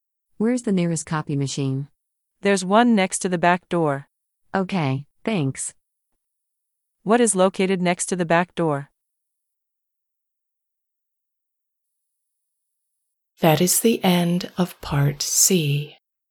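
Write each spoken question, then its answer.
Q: What is located next to the back door?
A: a copy machine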